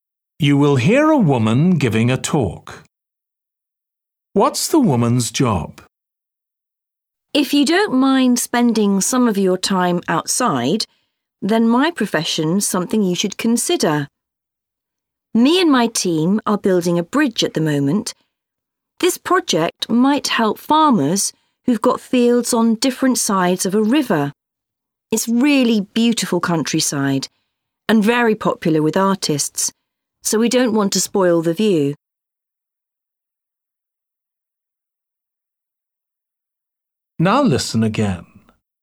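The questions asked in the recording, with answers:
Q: What's the woman's job?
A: She builds bridges (engineer)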